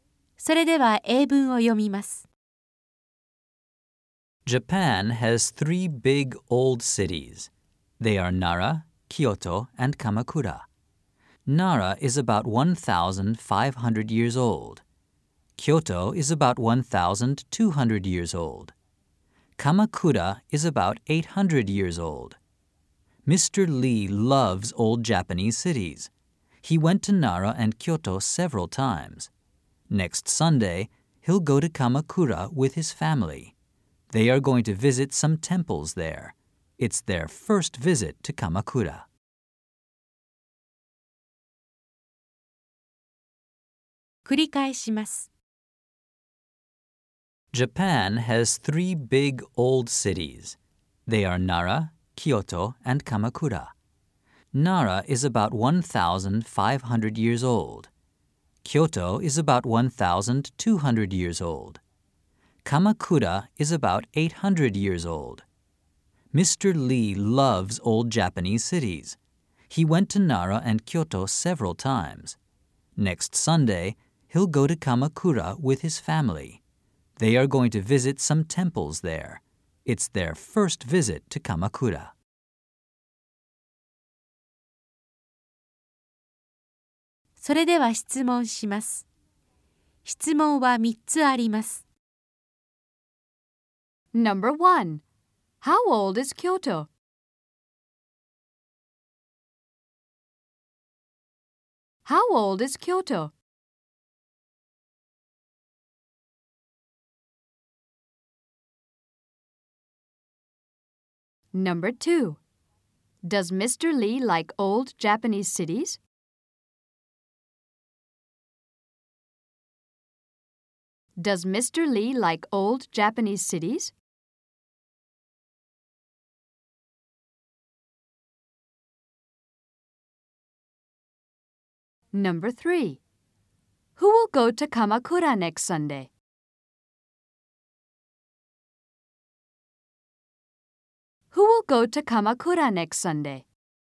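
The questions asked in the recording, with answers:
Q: How old is Kyoto?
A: About 1,200 years old.

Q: Does Mr. Lee like old Japanese cities?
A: Yes, he does.

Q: Who will go to Kamakura next Sunday?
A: Mr. Lee and his family.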